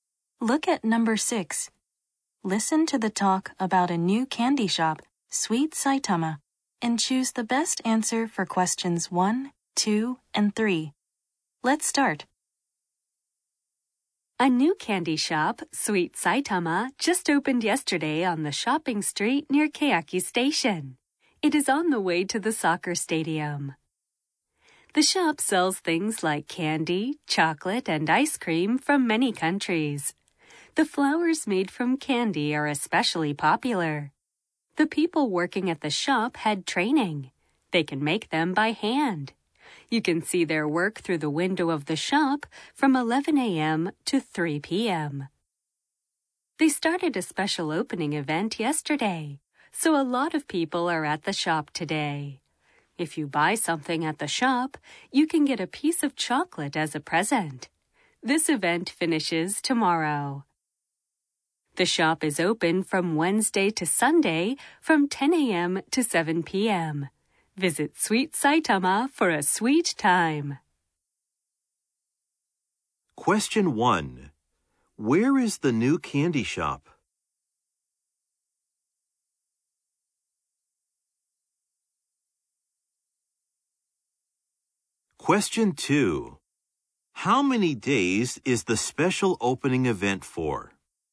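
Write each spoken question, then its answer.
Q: Where is the new candy shop?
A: On the shopping street near Keyaki Station.

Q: How many days is the special opening event for?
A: Three days.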